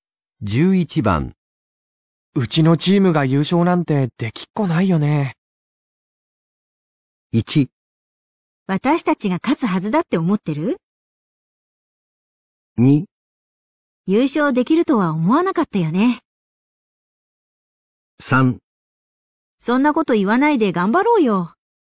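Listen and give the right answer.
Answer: 3: そんなこと言わないで頑張ろうよ。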